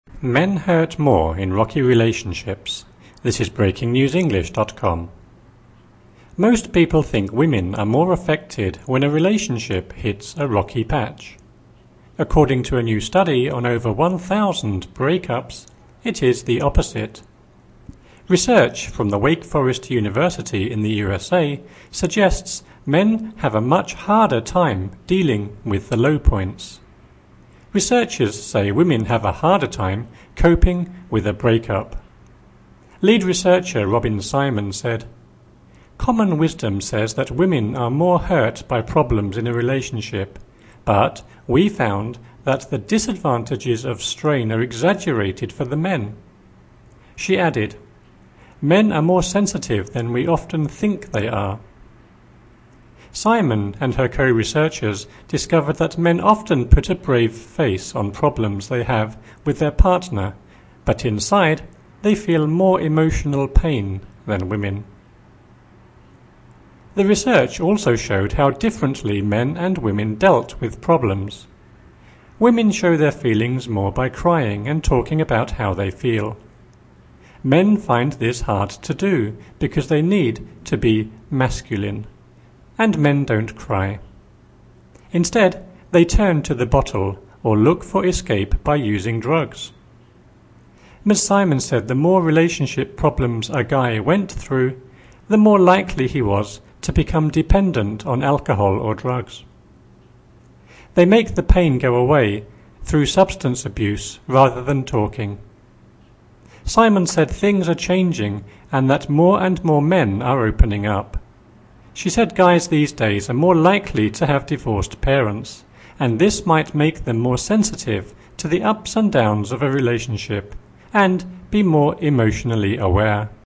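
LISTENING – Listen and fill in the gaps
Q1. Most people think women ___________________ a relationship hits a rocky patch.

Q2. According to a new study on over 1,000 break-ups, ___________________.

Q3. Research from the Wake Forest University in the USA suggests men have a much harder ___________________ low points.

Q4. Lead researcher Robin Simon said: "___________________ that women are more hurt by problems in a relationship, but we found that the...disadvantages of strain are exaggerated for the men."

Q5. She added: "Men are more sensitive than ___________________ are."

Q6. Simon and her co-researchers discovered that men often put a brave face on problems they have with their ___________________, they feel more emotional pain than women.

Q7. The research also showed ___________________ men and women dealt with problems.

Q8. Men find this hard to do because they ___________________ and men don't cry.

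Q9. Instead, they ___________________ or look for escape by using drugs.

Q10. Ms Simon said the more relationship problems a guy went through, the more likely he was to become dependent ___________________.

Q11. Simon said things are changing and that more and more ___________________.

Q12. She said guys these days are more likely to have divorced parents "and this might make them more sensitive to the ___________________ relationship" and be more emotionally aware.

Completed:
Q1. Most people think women are more affected when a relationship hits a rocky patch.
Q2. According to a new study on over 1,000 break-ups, it is the opposite.
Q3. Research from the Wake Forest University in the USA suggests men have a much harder time dealing with the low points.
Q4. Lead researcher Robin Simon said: "Common wisdom says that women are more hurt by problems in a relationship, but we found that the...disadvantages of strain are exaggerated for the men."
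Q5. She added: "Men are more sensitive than we often think they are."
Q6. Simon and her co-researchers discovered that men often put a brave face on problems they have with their partner but inside, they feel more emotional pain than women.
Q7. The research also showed how differently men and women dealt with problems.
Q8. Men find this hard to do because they need to be 'masculine' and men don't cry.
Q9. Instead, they turn to the bottle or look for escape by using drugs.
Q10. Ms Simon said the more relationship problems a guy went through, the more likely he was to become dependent on alcohol or drugs.
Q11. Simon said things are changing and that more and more men are opening up.
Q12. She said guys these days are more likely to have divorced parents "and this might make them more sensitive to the ups and downs of a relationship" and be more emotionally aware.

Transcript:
1.
Men hurt more in rocky relationships
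Most people think women are more affected when a relationship hits a rocky patch. According to a new study on over 1,000 break-ups, it is the opposite. Research from the Wake Forest University in the USA suggests men have a much harder time dealing with the low points. Researchers say women have a harder time coping with a break-up. Lead researcher Robin Simon said: "Common wisdom says that women are more hurt by problems in a relationship, but we found that the...disadvantages of strain are exaggerated for the men." She added: "Men are more sensitive than we often think they are." Simon and her co-researchers discovered that men often put a brave face on problems they have with their partner but inside, they feel more emotional pain than women.
The research also showed how differently men and women dealt with problems. Women show their feelings more by crying and talking about how they feel. 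Men find this hard to do because they need to be 'masculine' and men don't cry. Instead, they turn to the bottle or look for escape by using drugs. Ms Simon said the more relationship problems a guy went through, the more likely he was to become dependent on alcohol or drugs. They make the pain go away through substance abuse rather than talking. Simon said things are changing and that more and more men are opening up. She said guys these days are more likely to have divorced parents "and this might make them more sensitive to the ups and downs of a relationship" and be more emotionally aware.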